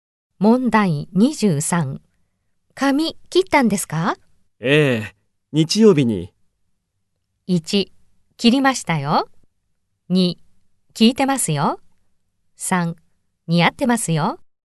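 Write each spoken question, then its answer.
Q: 髪切ったんですか?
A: 3: 似合ってますよ。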